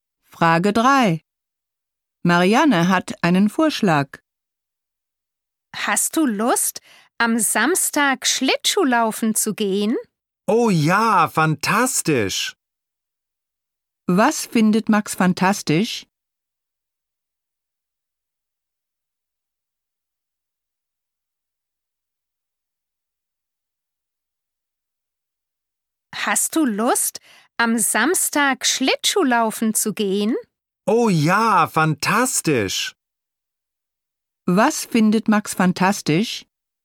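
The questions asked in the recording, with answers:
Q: Was findet Max fantastisch?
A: Am Samstag Schlittschuhlaufen zu gehen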